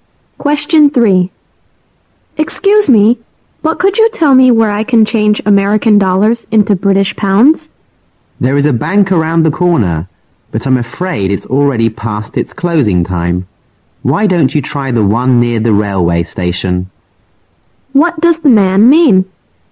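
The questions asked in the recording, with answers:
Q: What does the man mean?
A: The nearby bank is closed, so try the bank near the railway station.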